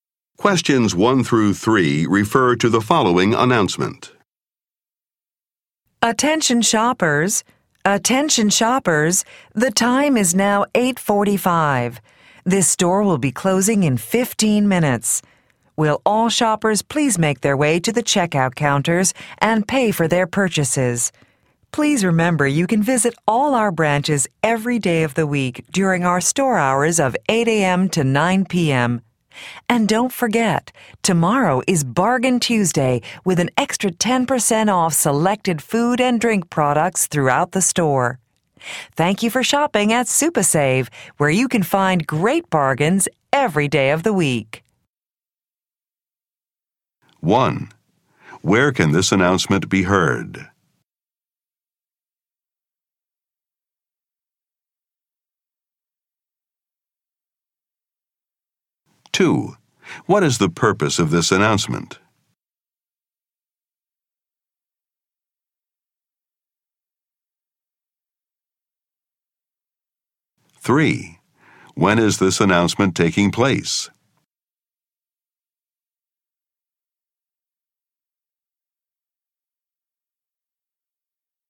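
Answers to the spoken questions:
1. In a store (SuperSave)
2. To tell shoppers the store is closing soon
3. On a Monday evening, at 8:45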